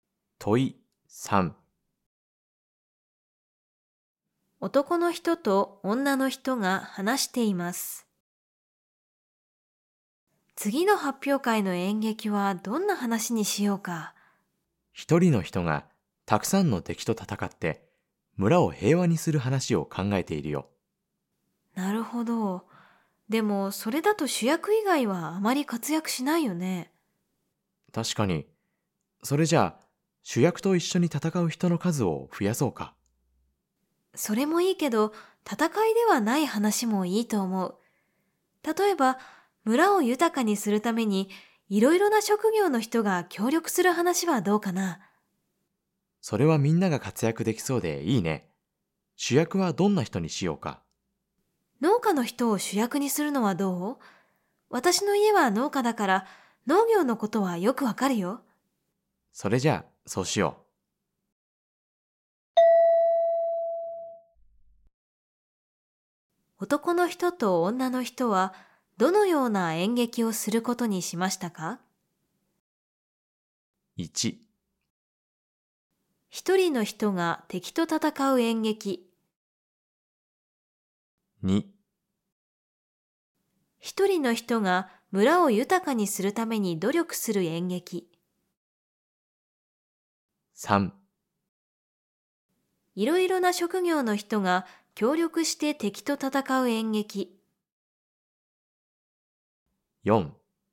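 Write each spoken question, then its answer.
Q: 男の人と女の人はどのような演劇をすることにしましたか?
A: 4: いろいろな職業の人が協力して村を豊かにする演劇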